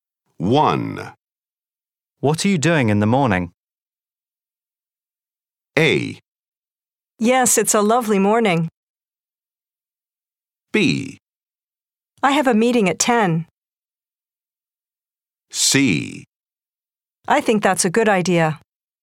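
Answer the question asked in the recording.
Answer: B: I have a meeting at 10.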